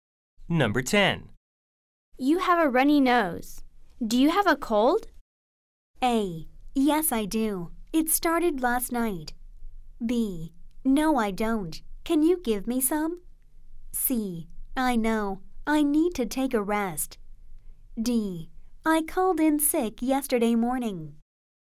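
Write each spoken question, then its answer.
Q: You have a runny nose. Do you have a cold?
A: A: Yes, I do. It started last night.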